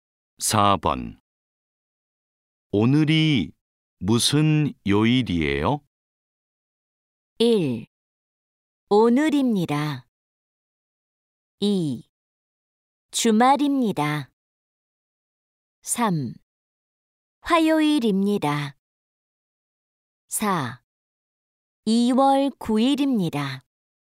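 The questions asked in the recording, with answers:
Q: 오늘이 무슨 요일이에요?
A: 3: 화요일입니다.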